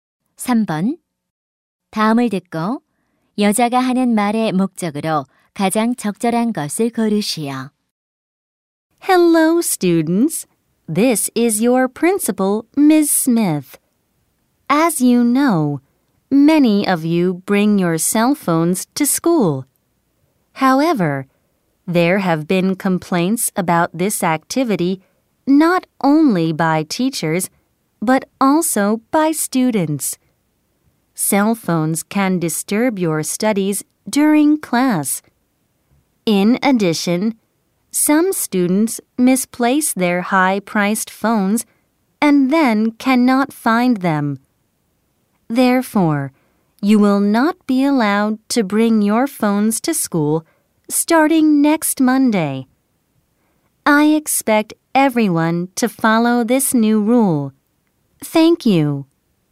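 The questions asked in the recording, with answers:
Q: 다음을 듣고 여자가 하는 말의 목적으로 가장 적절한 것을 고르시오.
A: 다음 주 월요일부터 학교에 휴대폰 반입 금지를 알리려고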